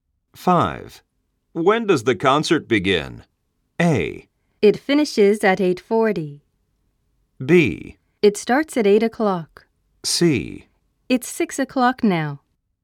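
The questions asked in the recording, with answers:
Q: When does the concert begin?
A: B: It starts at 8 o'clock.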